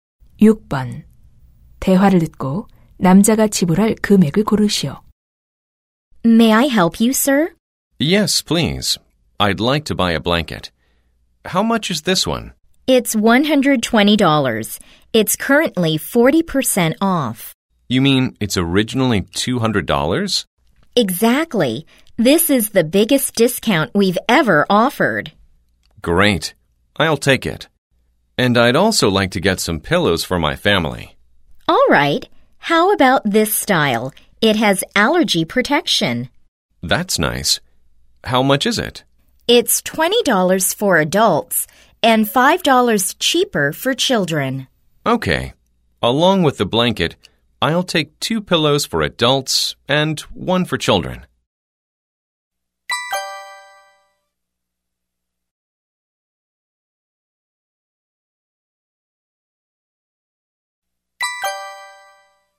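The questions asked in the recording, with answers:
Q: 대화를 듣고 남자가 지불할 금액을 고르시오.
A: $175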